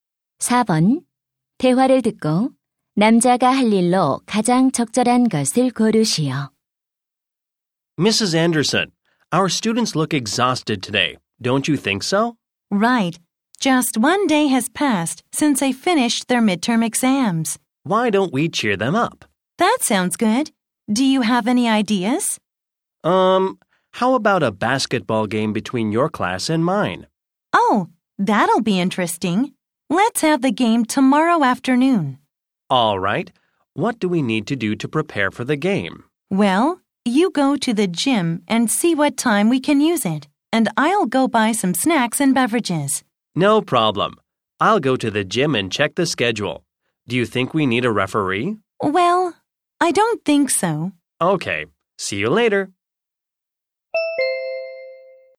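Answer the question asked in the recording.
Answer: 체육관 사용 일정 확인하기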